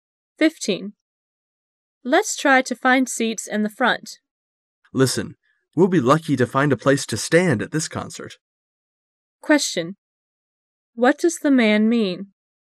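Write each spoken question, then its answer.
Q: What does the man mean?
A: The concert is so crowded they may not even find standing room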